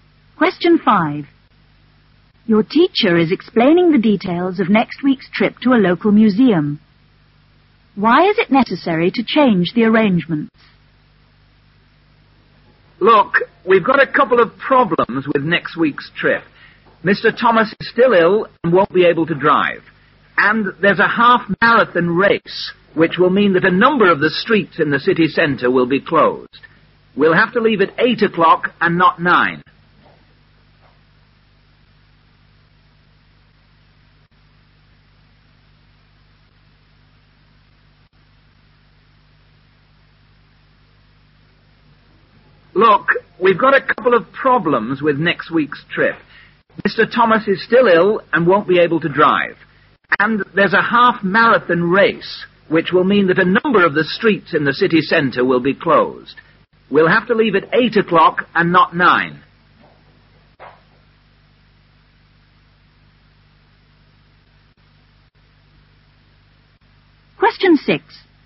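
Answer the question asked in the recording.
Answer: Mr Thomas is ill and can't drive, and streets in the city centre will be closed for a half-marathon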